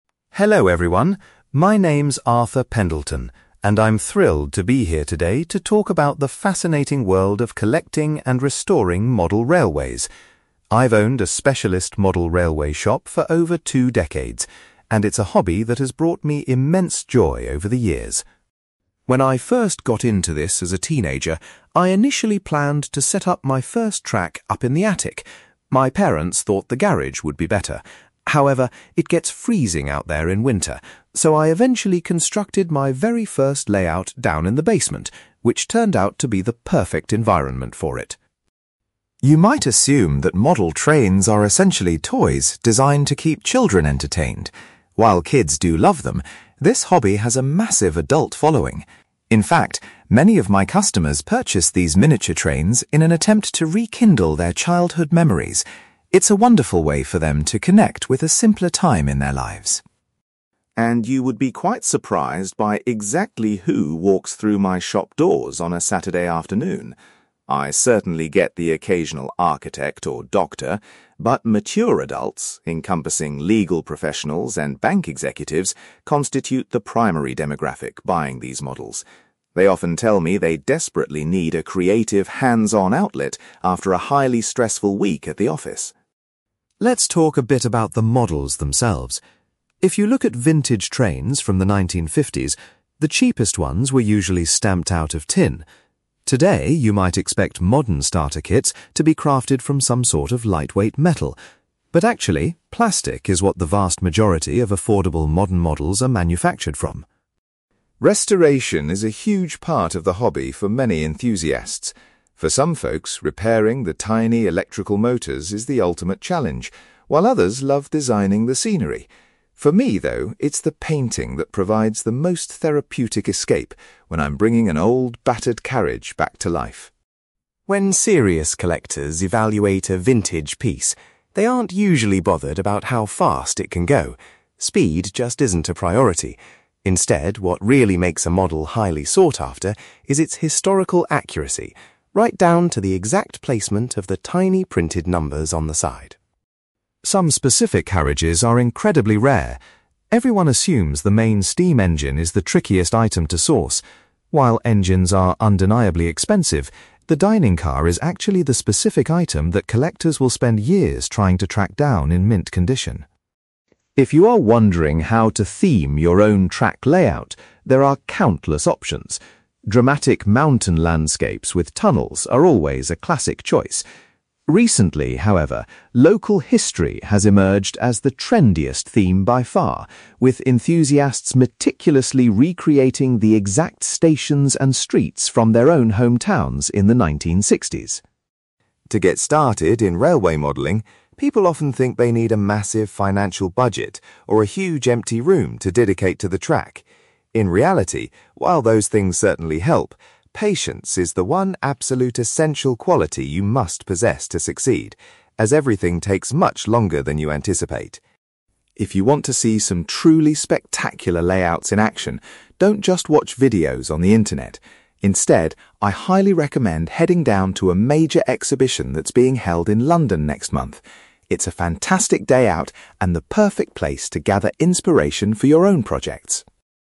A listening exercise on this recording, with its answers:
You will hear a man called Arthur Pendelton giving a presentation about his career running a model railway shop. For questions 9-18, complete the sentences with a word or short phrase.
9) Arthur ultimately decided to build his first model railway in a (9)........................... .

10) Many adults buy model trains because they want to bring back their (10)............................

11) Arthur notes that lawyers and (11)........................... are the main types of professionals who purchase from his shop.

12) Nowadays, the most inexpensive starter models are made of (12)........................... .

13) When restoring old trains, Arthur finds the process of (13)........................... to be the most relaxing.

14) Serious collectors value a model's (14)........................... more than how fast it can travel.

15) Arthur explains that a (15)........................... is often the most difficult piece of a train to find.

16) A current trend among modellers is basing their track layouts on (16)........................... .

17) Arthur believes that having (17)........................... is the most important requirement for the hobby.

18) Arthur suggests visiting an upcoming (18)........................... in London to get ideas for a layout.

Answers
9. basement
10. childhood memories
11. bank executives
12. plastic
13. painting
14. historical accuracy
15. dining car
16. local history
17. patience
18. exhibition

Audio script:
Arthur: Hello everyone! My name's Arthur Pendelton, and I'm thrilled to be here today to talk about the fascinating world of collecting and restoring model railways. I've owned a specialist model railway shop for over two decades, and it's a hobby that has brought me immense joy over the years.
When I first got into this as a teenager, I initially planned to set up my first track up in the attic. My parents thought the garage would be better. However, it gets freezing out there in winter, so I eventually constructed my very first layout down in the basement, which turned out to be the perfect environment for it.
You might assume that model trains are essentially toys designed to keep children entertained. While kids do love them, this hobby has a massive adult following. In fact, many of my customers purchase these miniature trains in an attempt to rekindle their childhood memories. It's a wonderful way for them to connect with a simpler time in their lives.
And you would be quite surprised by exactly who walks through my shop doors on a Saturday afternoon. I certainly get the occasional architect or doctor, but mature adults, encompassing legal professionals and bank executives, constitute the primary demographic buying these models. They often tell me they desperately need a creative, hands-on outlet after a highly stressful week at the office.
Let's talk a bit about the models themselves. If you look at vintage trains from the 1950s, the cheapest ones were usually stamped out of tin. Today, you might expect modern starter kits to be crafted from some sort of lightweight metal, but actually, plastic is what the vast majority of affordable modern models are manufactured from.
Restoration is a huge part of the hobby for many enthusiasts. For some folks, repairing the tiny electrical motors is the ultimate challenge, while others love designing the scenery. For me, though, it's the painting that provides the most therapeutic escape when I'm bringing an old, battered carriage back to life.
When serious collectors evaluate a vintage piece, they aren't usually bothered about how fast it can go. Speed just isn't a priority. Instead, what really makes a model highly sought-after is its historical accuracy – right down to the exact placement of the tiny printed numbers on the side.
Some specific carriages are incredibly rare. Everyone assumes the main steam engine is the trickiest item to source. While engines are undeniably expensive, the dining car is actually the specific item that collectors will spend years trying to track down in mint condition.
If you are wondering how to theme your own track layout, there are countless options. Dramatic mountain landscapes with tunnels are always a classic choice. Recently, however, local history has emerged as the trendiest theme by far, with enthusiasts meticulously recreating the exact stations and streets from their own hometowns in the 1960s.
To get started in railway modelling, people often think they need a massive financial budget or a huge empty room to dedicate to the track. In reality, while those things certainly help, patience is the one absolute essential quality you must possess to succeed, as everything takes much longer than you anticipate.
If you want to see some truly spectacular layouts in action, don't just watch videos on the internet. Instead, I highly recommend heading down to a major exhibition that's being held in London next month. It's a fantastic day out and the perfect place to gather inspiration for your own projects.

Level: B2